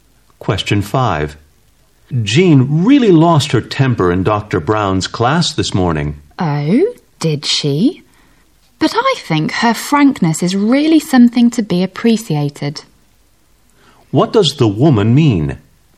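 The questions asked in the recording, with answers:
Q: What does the woman mean?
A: She admires Jean's frankness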